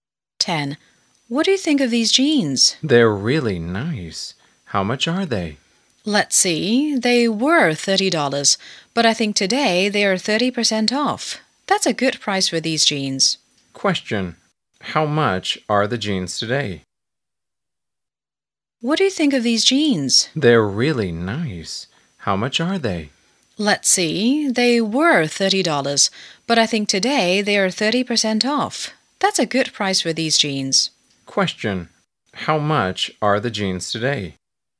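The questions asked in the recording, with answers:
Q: how much are the jeans today?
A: $21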